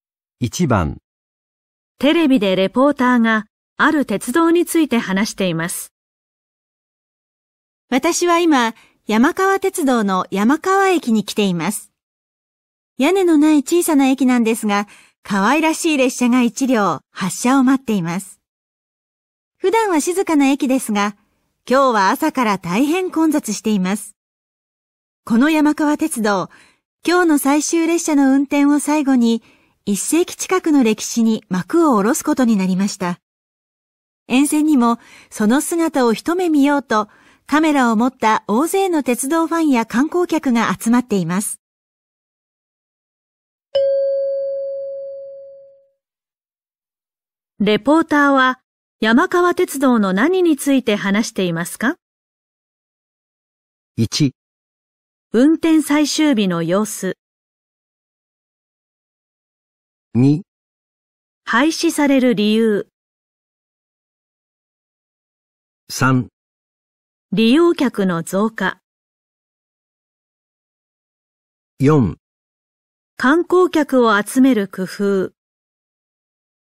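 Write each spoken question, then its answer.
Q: レポーターは、山川鉄道の何について話していますか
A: 1: 運転最終日の様子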